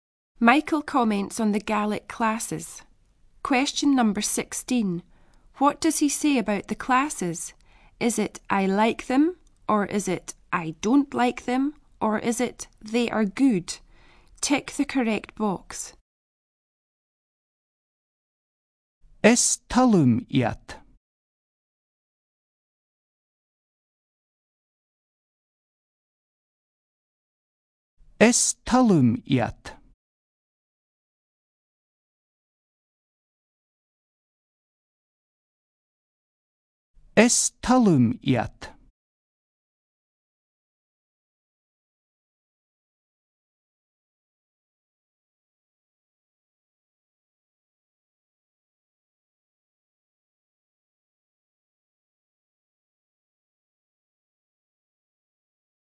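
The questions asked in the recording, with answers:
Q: What does he say about the classes?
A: A: I like them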